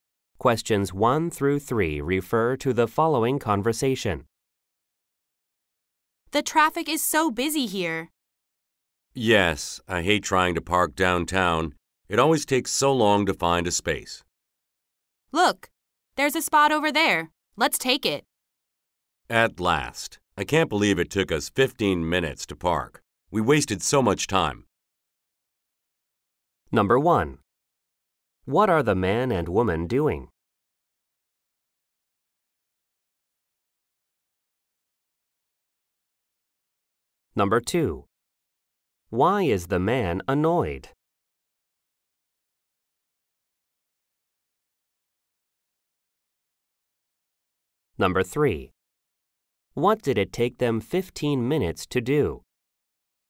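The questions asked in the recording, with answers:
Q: What are the man and woman doing?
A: Looking for a parking space downtown

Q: What did it take them 15 minutes to do?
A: Park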